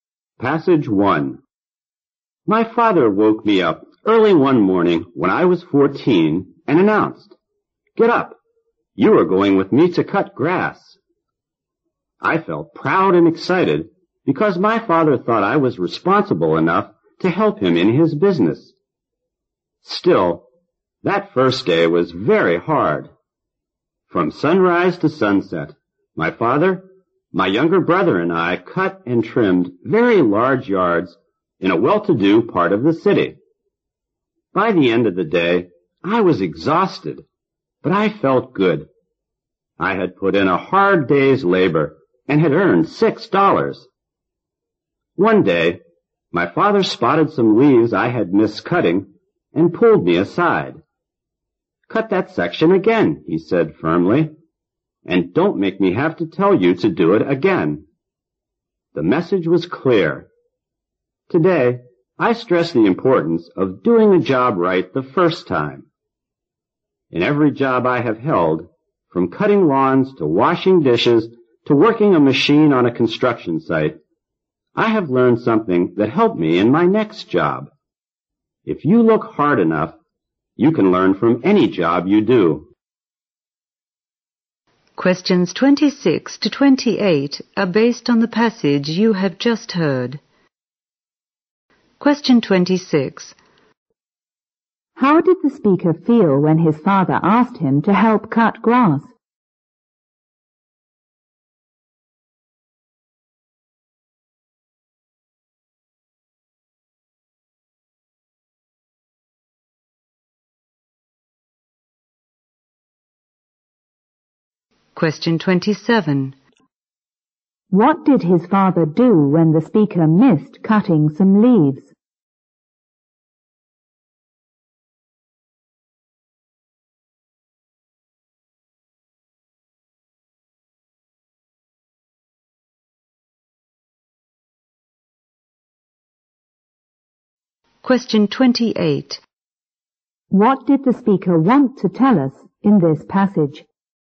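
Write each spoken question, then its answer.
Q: How did the speaker feel when his father asked him to help cut grass?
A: Proud and excited

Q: What did his father do when the speaker missed cutting some leaves?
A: He firmly told him to cut that section again

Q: What did the speaker want to tell us in this passage?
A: You can learn from any job you do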